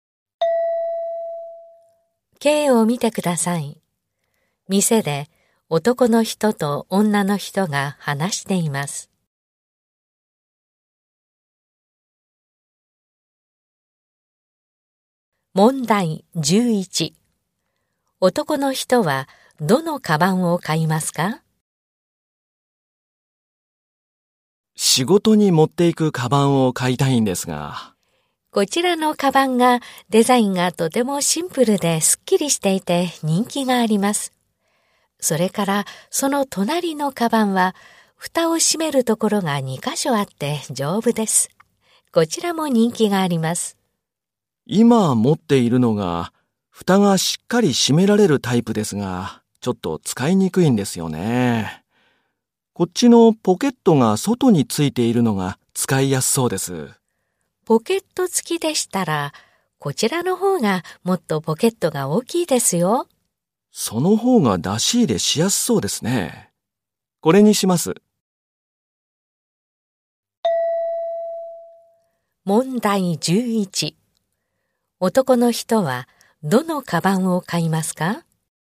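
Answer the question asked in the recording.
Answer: 外に大きいポケットがついているカバン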